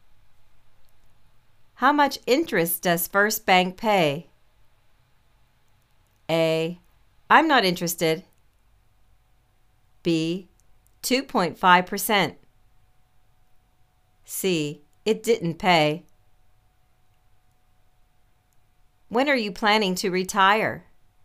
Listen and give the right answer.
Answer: 2.5 percent